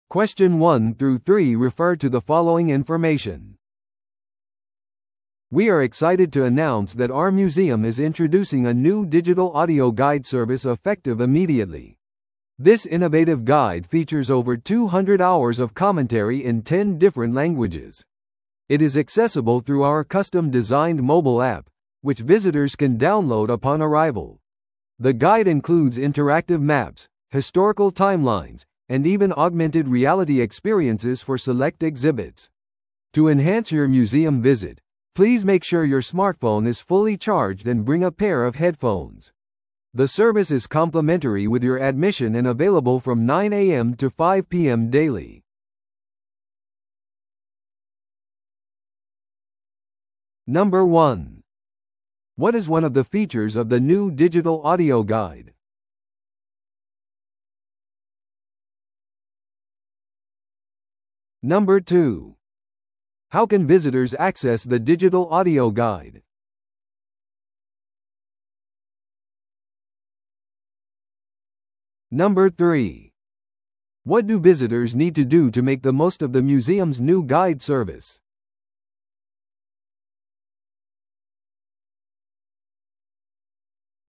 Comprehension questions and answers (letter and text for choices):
Listen to the audio below and answer the questions.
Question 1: What is one of the features of the new digital audio guide?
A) 複数の言語で印刷されたガイドブック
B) 初心者向けの無料アートクラス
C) 拡張現実体験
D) 博物館カフェでの無料コーヒー無制限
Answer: C) 拡張現実体験

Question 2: How can visitors access the digital audio guide?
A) 展示物にあるQRコードをスキャンすることで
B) モバイルアプリを通じて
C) インフォメーションデスクでデバイスをレンタルすることによって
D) メールで送られたリンクを通じて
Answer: B) モバイルアプリを通じて

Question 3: What do visitors need to do to make the most of the museum's new guide service?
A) ガイドブックのレンタルに少額の料金を支払う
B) スマートフォンを完全に充電しておき、ヘッドフォンを持参する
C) 事前に訪問を予約する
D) 博物館の会員になる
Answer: B) スマートフォンを完全に充電しておき、ヘッドフォンを持参する

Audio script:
We are excited to announce that our museum is introducing a new digital audio guide service effective immediately. This innovative guide features over two hundred hours of commentary in ten different languages. It is accessible through our custom-designed mobile app, which visitors can download upon arrival. The guide includes interactive maps, historical timelines, and even augmented reality experiences for select exhibits. To enhance your museum visit, please make sure your smartphone is fully charged and bring a pair of headphones. The service is complimentary with your admission and available from 9am to 5pm daily.